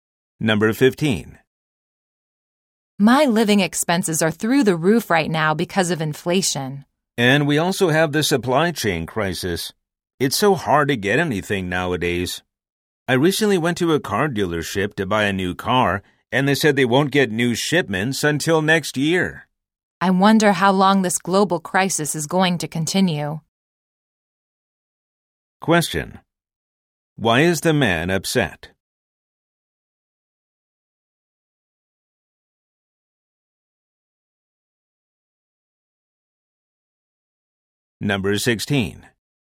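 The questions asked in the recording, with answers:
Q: Why is the man upset?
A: Inflation and the supply chain crisis; he can't get a new car until next year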